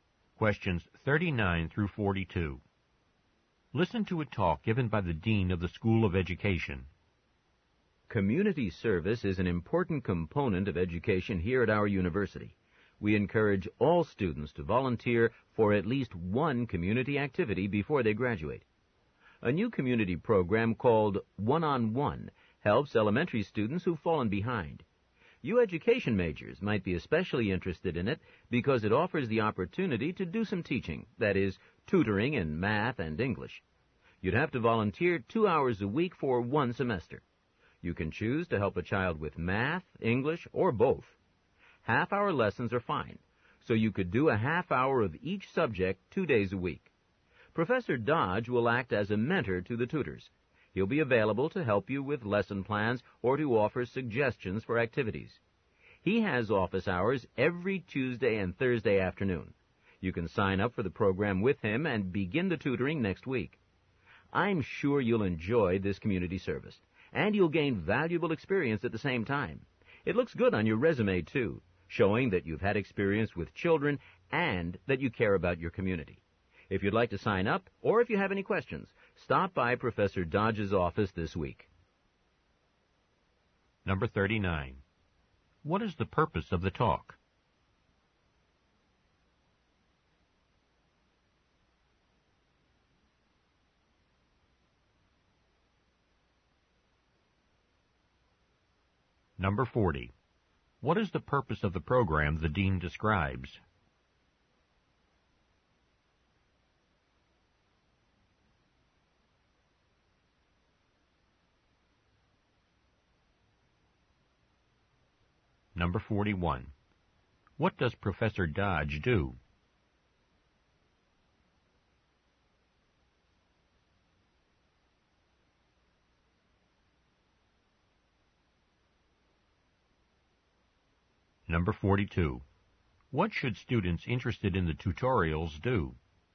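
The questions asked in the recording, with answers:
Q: What is the purpose of the talk?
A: To encourage students to volunteer for a tutoring program

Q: What is the purpose of the program the dean describes?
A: To help elementary students who've fallen behind

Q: What does Professor Dodge do?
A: He acts as a mentor to the tutors

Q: What should students interested in the tutorials do?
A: Stop by Professor Dodge's office this week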